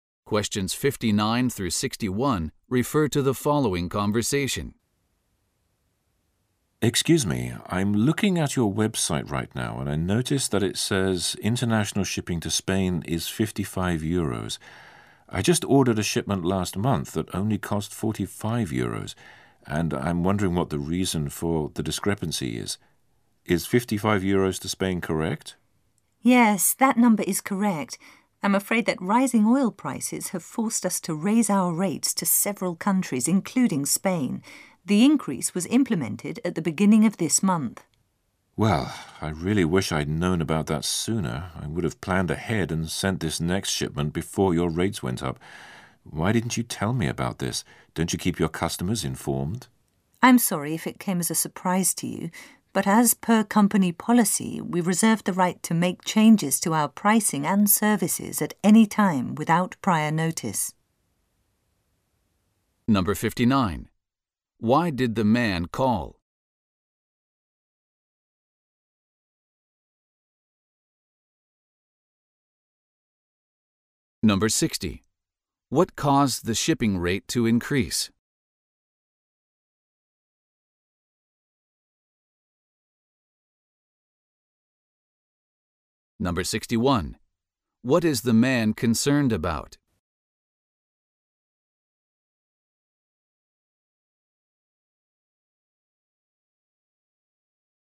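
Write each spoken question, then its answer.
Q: Why did the man call?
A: To ask why the shipping rate to Spain is higher than before

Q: What caused the shipping rate to increase?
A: Rising oil prices

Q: What is the man concerned about?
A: He was not told about the price increase in advance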